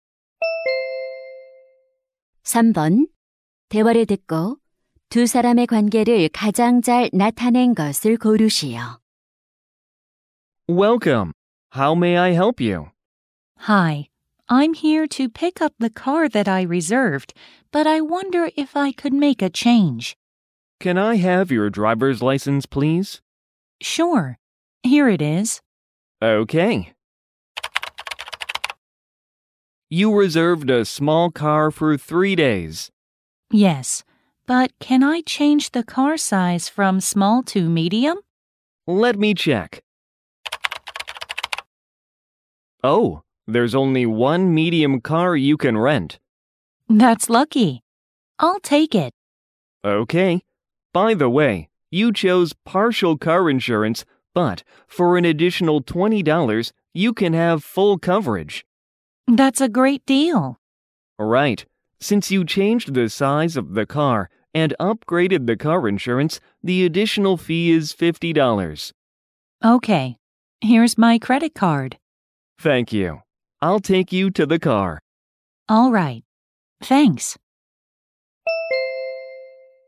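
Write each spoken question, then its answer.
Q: 대화를 듣고 두 사람의 관계를 가장 잘 나타낸 것을 고르시오.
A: 렌터카 직원 - 고객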